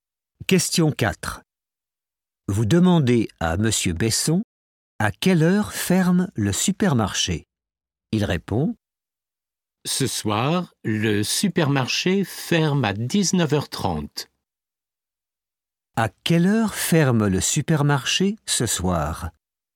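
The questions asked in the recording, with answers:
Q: À quelle heure ferme le supermarché ce soir?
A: à 19h30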